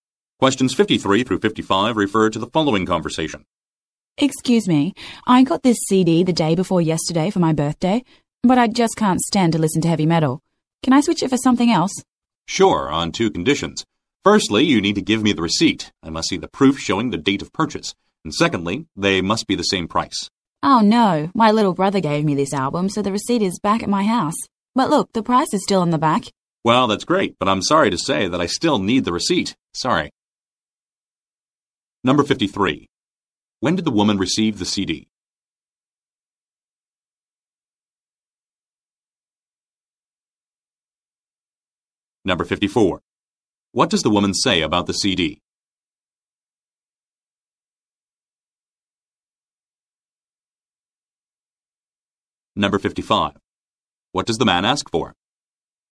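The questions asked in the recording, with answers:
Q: When did the woman receive the CD?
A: The day before yesterday

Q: What does the woman say about the CD?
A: She can't stand heavy metal / wants to switch it

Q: What does the man ask for?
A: The receipt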